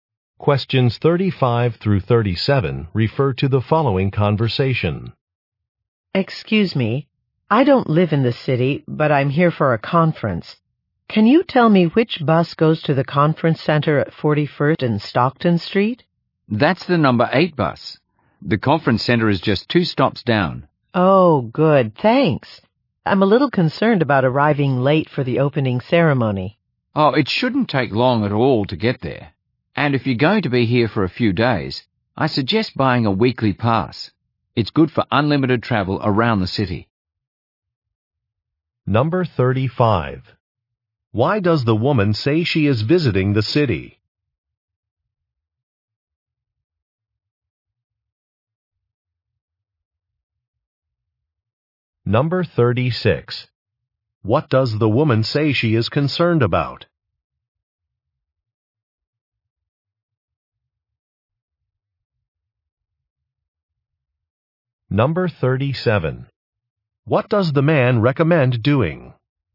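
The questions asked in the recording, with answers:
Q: Why does the woman say she is visiting the city?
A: For a conference

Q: What does the woman say she is concerned about?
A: Arriving late for the opening ceremony

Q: What does the man recommend doing?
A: Buying a weekly pass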